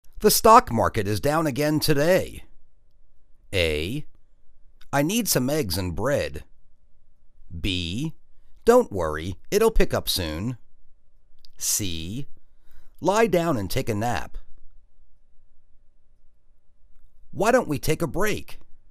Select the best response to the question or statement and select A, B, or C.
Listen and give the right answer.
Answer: Don't worry, it'll pick up soon.